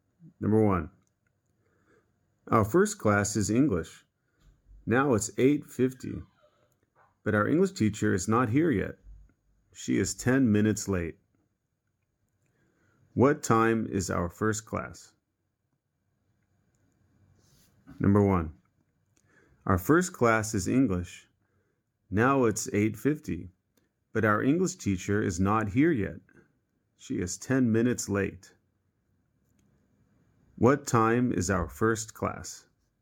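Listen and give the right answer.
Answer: 8:40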